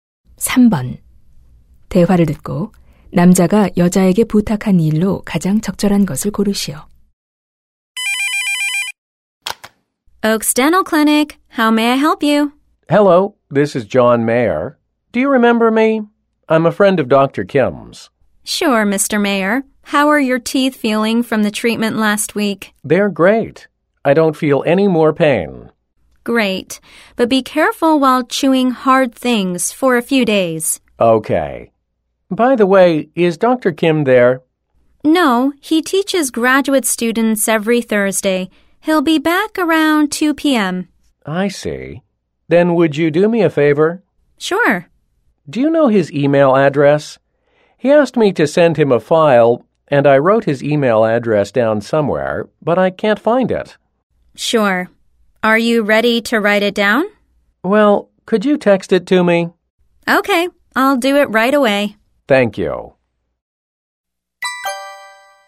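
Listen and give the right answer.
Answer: Dr. Kim의 이메일 주소를 문자로 보내 주기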